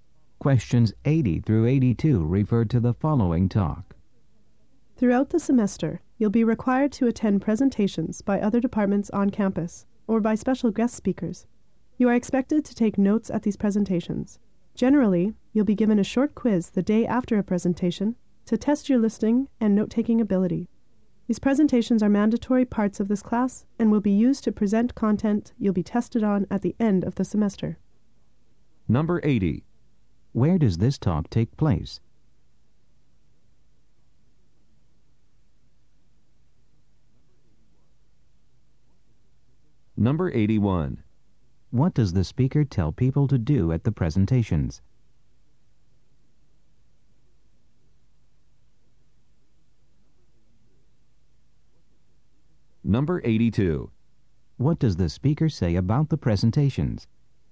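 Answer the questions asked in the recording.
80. In a class
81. Take notes
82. They are mandatory and their content will be tested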